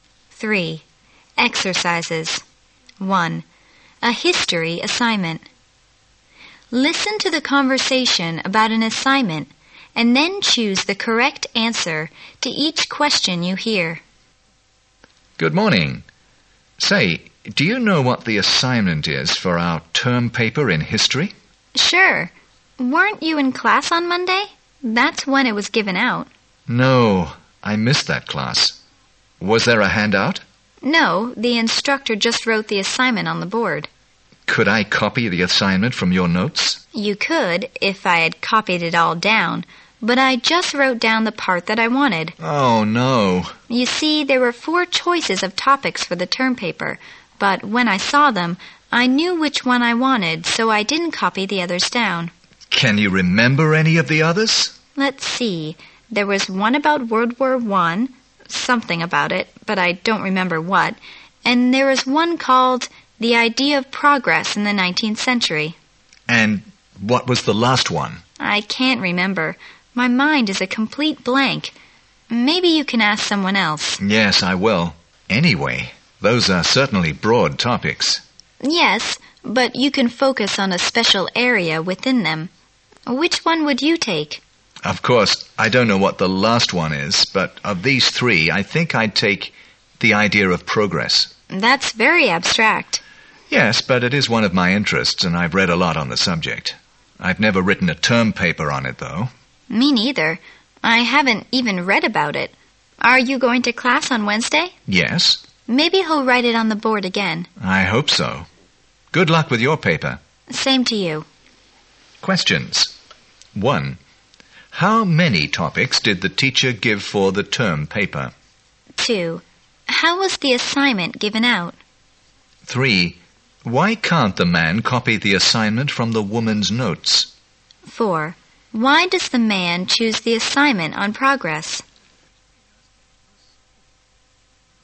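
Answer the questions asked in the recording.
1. Four
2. The instructor wrote it on the board
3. She copied down only the topic she wanted
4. It is one of his interests and he has read a lot about it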